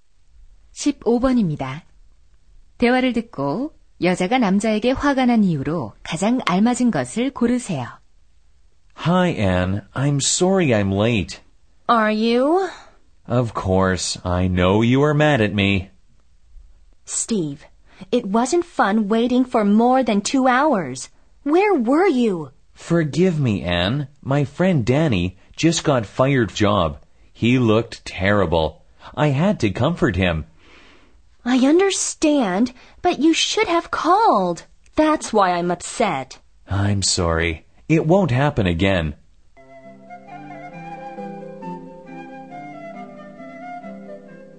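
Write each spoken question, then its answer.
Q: 대화를 듣고 여자가 남자에게 화가 난 이유로 가장 알맞은 것을 고르세요.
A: 늦는데 전화를 하지 않아서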